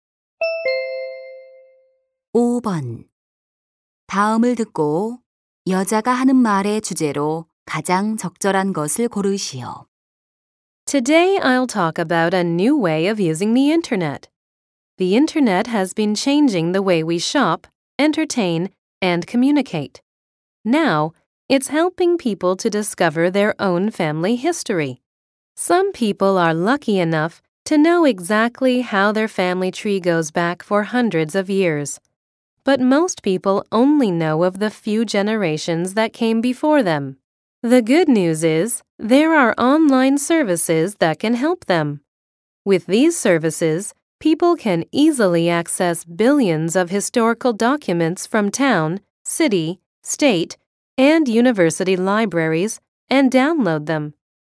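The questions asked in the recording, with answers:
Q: 다음을 듣고 여자가 하는 말의 주제로 가장 적절한 것을 고르시오.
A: 인터넷 서비스를 이용한 가족사 조사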